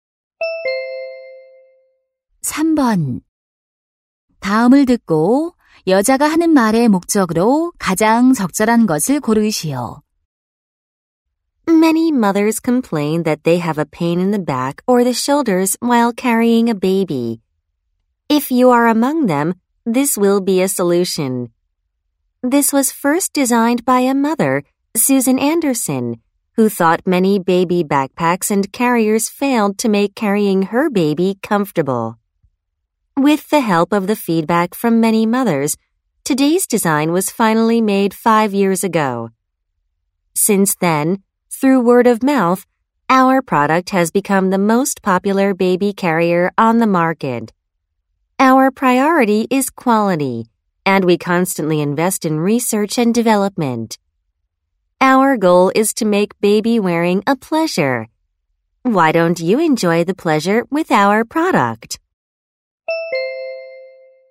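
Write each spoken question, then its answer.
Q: 다음을 듣고 여자가 하는 말의 목적으로 가장 적절한 것을 고르시오.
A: 아기 띠(캐리어) 제품을 광고하려고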